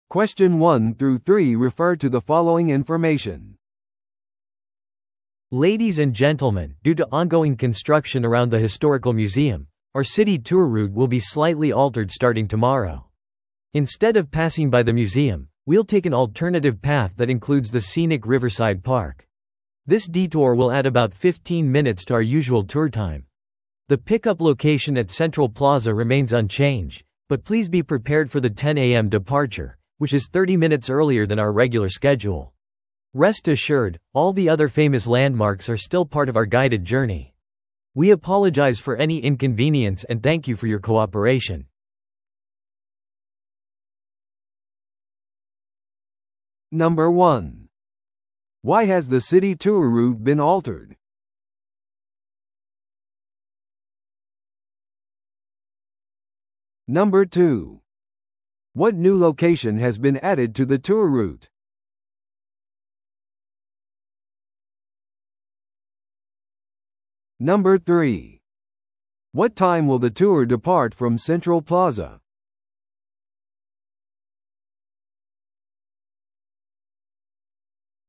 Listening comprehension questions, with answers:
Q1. Why has the city tour route been altered?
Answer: 工事のため

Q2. What new location has been added to the tour route?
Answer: リバーサイドパーク

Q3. What time will the tour depart from Central Plaza?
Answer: 10amに

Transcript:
Ladies and gentlemen, due to ongoing construction around the historical museum, our city tour route will be slightly altered starting tomorrow. Instead of passing by the museum, we'll take an alternative path that includes the scenic Riverside Park. This detour will add about 15 minutes to our usual tour time. The pickup location at Central Plaza remains unchanged, but please be prepared for the 10am departure, which is 30 minutes earlier than our regular schedule. Rest assured, all the other famous landmarks are still part of our guided journey. We apologize for any inconvenience and thank you for your cooperation.